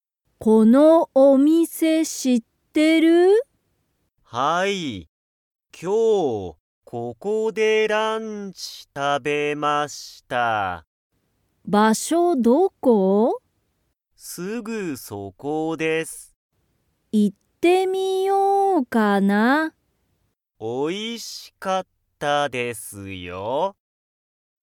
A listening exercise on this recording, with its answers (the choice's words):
そのレストランは、____。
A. 全然(ぜんぜん)おいしくない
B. よく行(い)く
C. すぐそこだ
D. 結構高(けっこうたか)い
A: すぐそこだ

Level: Level 1